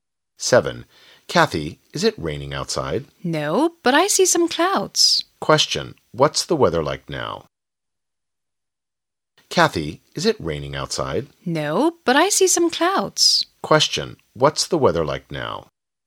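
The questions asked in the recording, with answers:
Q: what's the weather like now?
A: Cloudy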